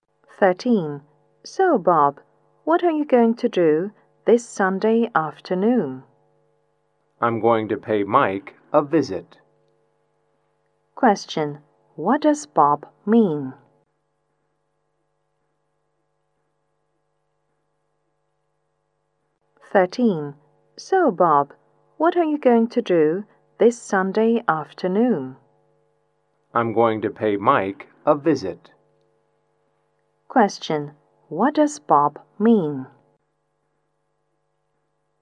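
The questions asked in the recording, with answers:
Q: What does Bob mean?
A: He will visit Mike on Sunday afternoon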